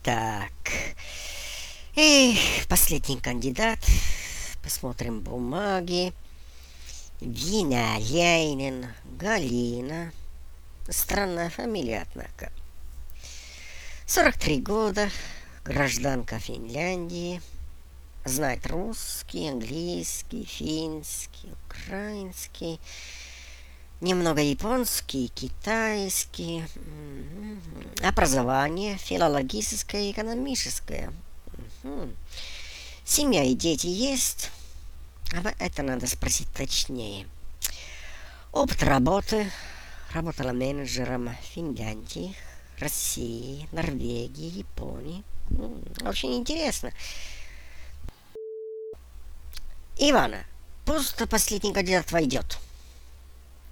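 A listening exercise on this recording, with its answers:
3. Резюме кандидата No3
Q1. Что вы узнали о ней?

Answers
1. 43 года, гражданка Финляндии, знает много языков, филологическое и экономическое образование, есть семья и дети, работала менеджером в разных странах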